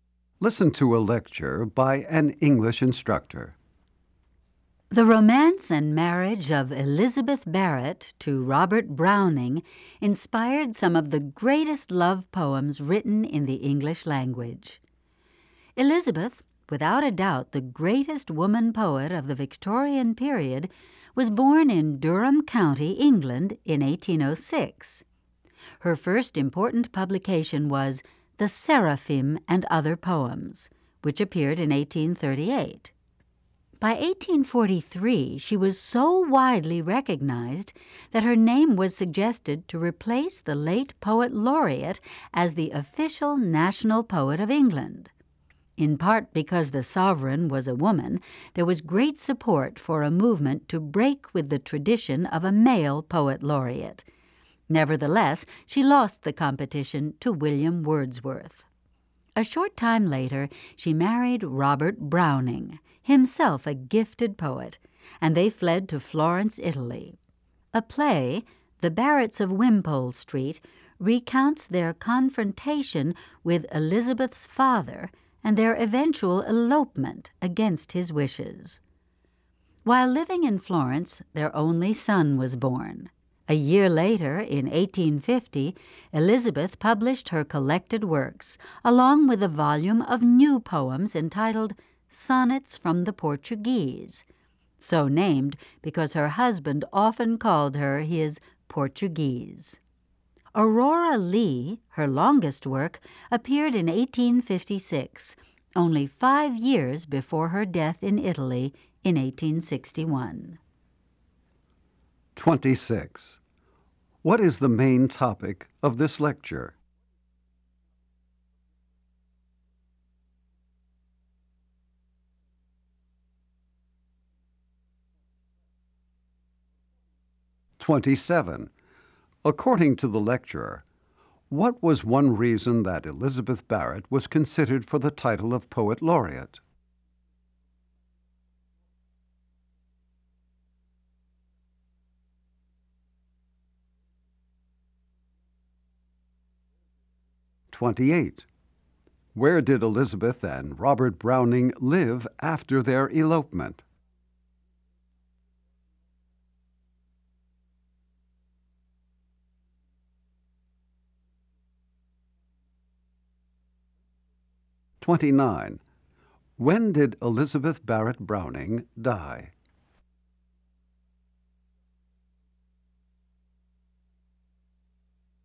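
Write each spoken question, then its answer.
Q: What is the main topic of this lecture?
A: The life and work of Elizabeth Barrett Browning

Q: According to the lecturer, what was one reason that Elizabeth Barrett was considered for the title of poet laureate?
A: The sovereign was a woman

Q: Where did Elizabeth and Robert Browning live after their elopement?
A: Florence, Italy

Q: When did Elizabeth Barrett Browning die?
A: 1861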